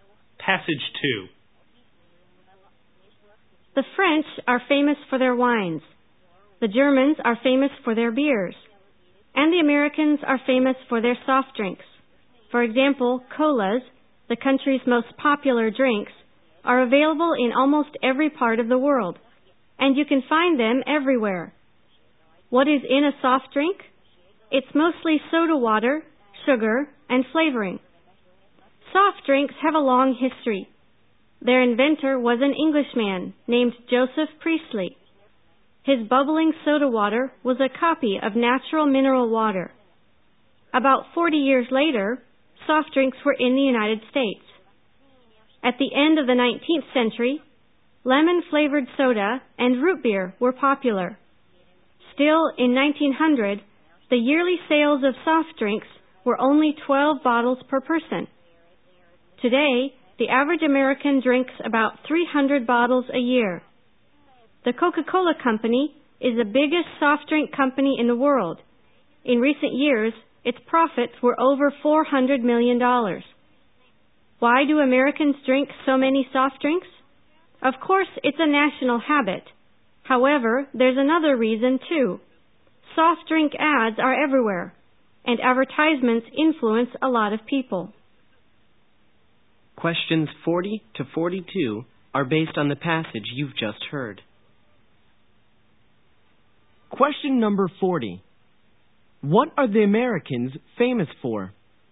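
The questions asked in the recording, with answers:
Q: What are the Americans famous for?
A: Soft drinks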